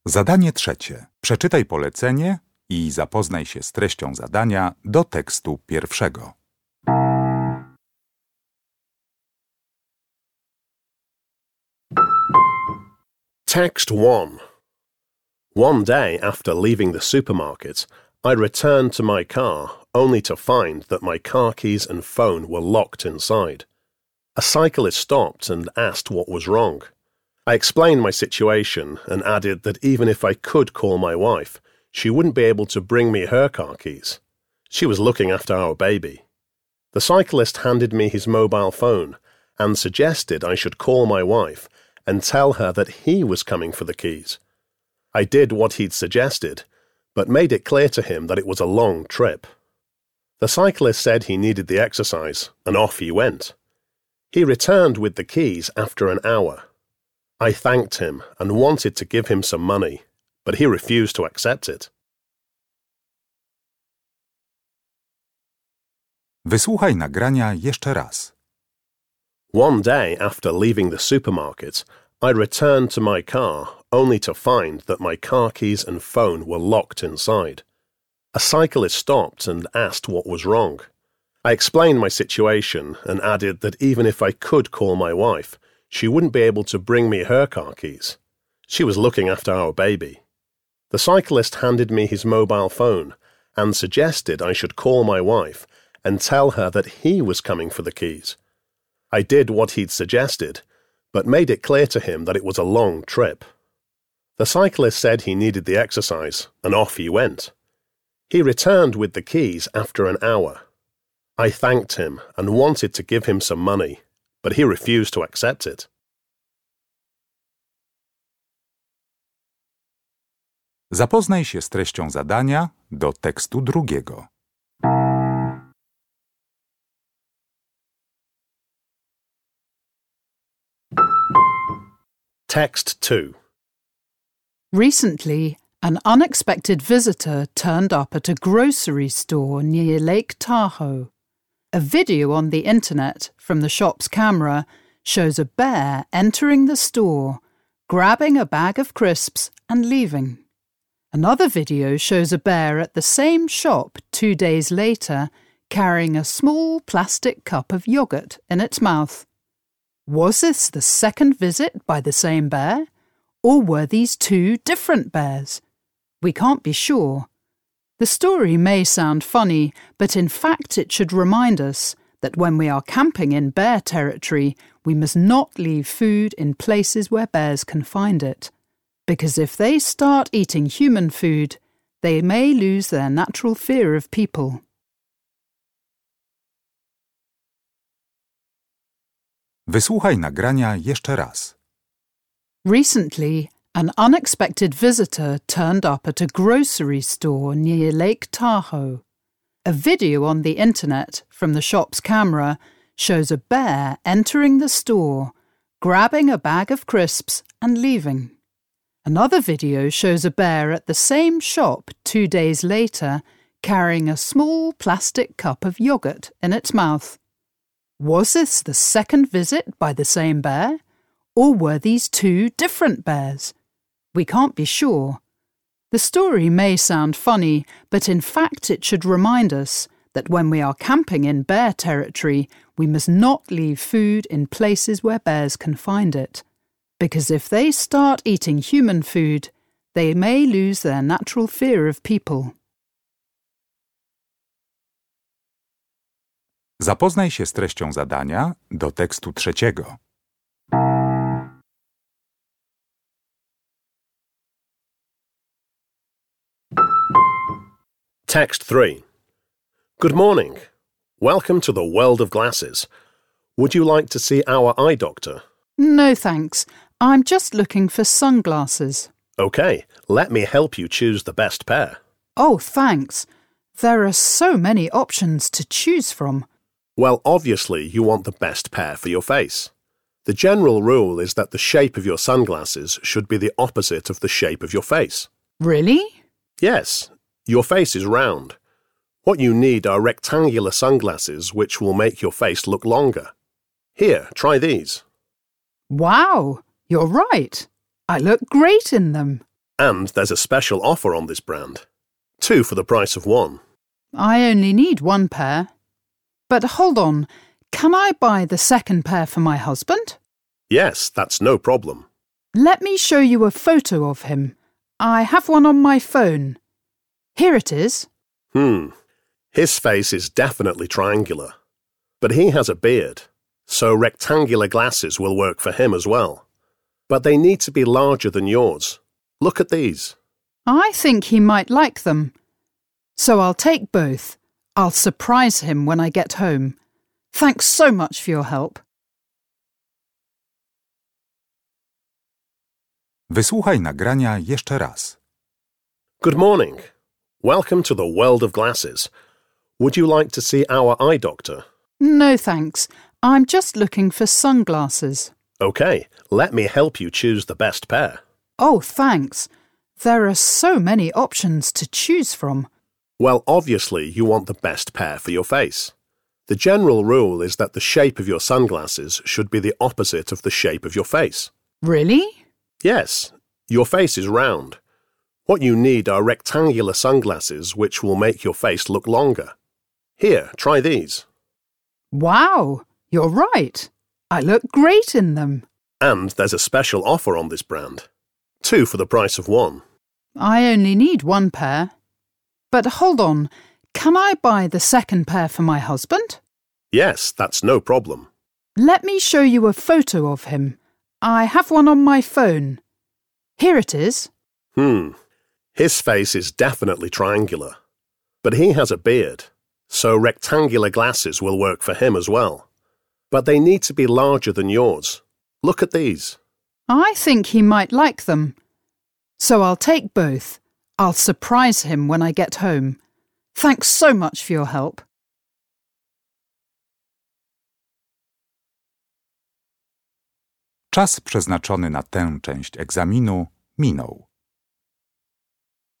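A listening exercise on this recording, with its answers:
Uruchamiając odtwarzacz z oryginalnym nagraniem CKE usłyszysz dwukrotnie trzy teksty. Z podanych odpowiedzi wybierz właściwą, zgodną z treścią nagrania.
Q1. The speaker tells this story in order to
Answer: warn campers not to leave food where bears can find it

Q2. The difference between the two pairs of sunglasses which the woman buys is in their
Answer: size

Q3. The woman is talking with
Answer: a shop assistant in a glasses shop

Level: Poziom: podstawowy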